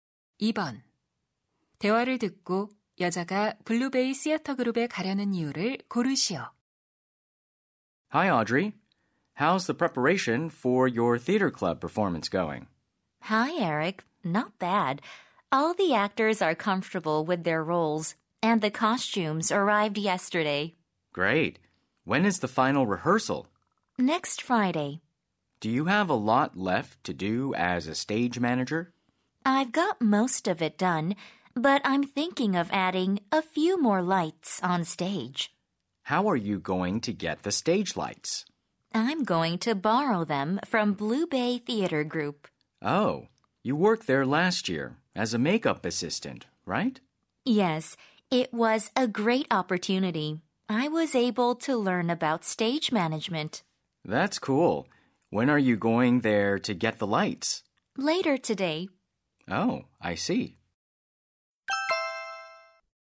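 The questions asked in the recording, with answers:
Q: 대화를 듣고 여자가 블루베이 시어터 그룹에 가려는 이유를 고르시오.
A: 무대 조명을 빌리려고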